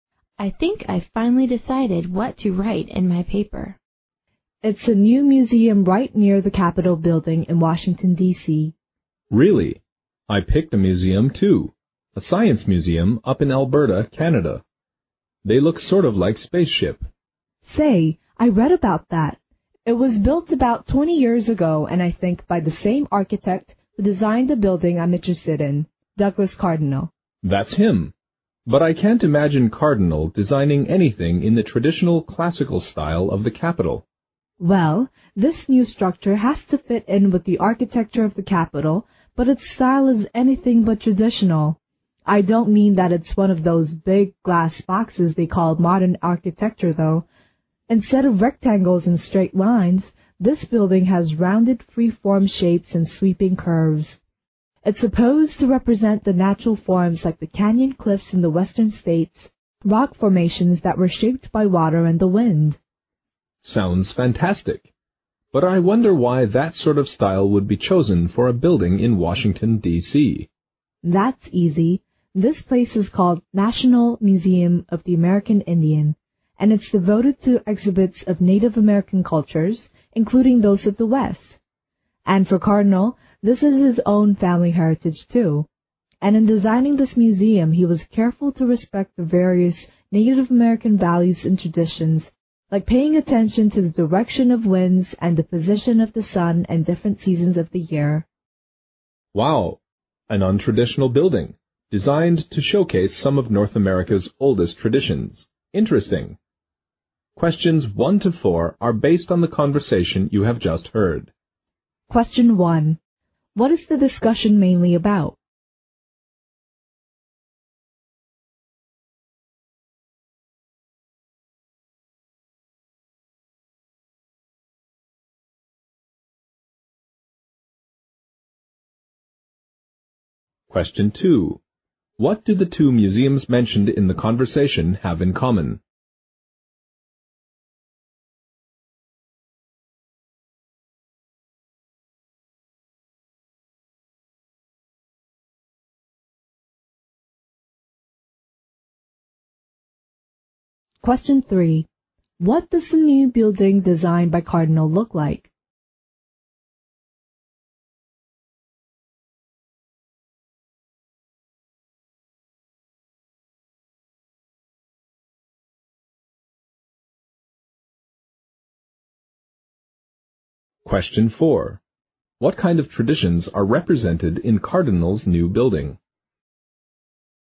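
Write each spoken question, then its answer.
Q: What is the discussion mainly about?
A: A new museum in Washington, D.C. designed by Douglas Cardinal

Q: What do the two museums mentioned in the conversation have in common?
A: They were designed by the same architect, Douglas Cardinal

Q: What does the new building designed by Cardinal look like?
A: It has rounded free-form shapes and sweeping curves like natural rock formations

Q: What kind of traditions are represented in Cardinal's new building?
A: Native American traditions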